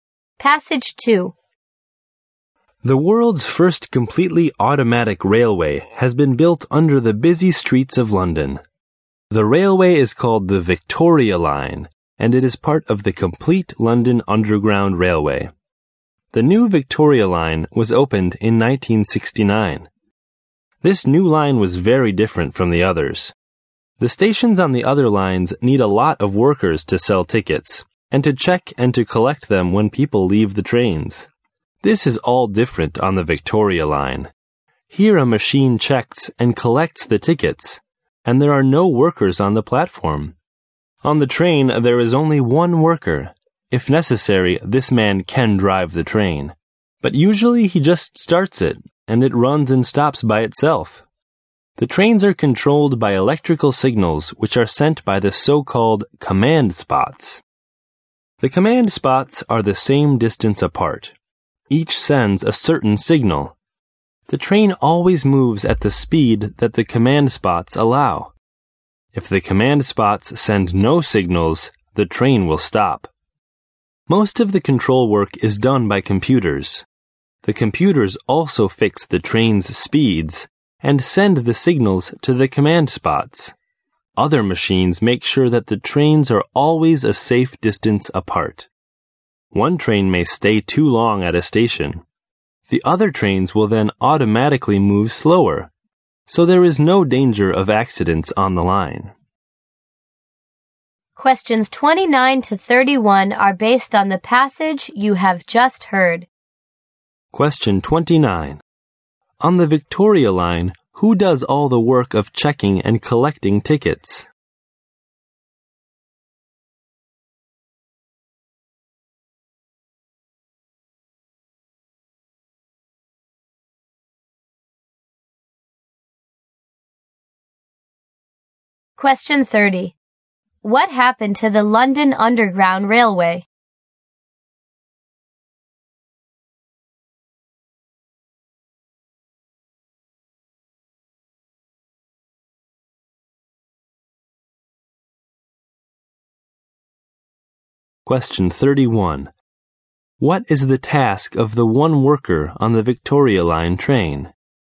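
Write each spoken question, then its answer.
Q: On the Victoria Line, who does all the work of checking and collecting tickets?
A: A machine

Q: What is the task of the one worker on the Victoria Line train?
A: He usually just starts the train, and drives it if necessary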